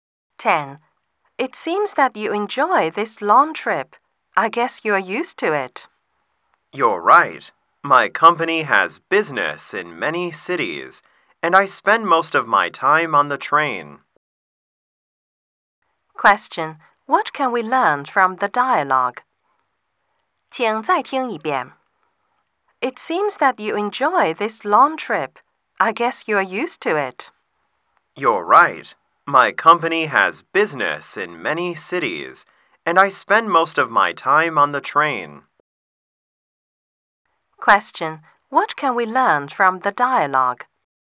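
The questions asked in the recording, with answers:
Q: What can we learn from the dialogue?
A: The man often travels by train on business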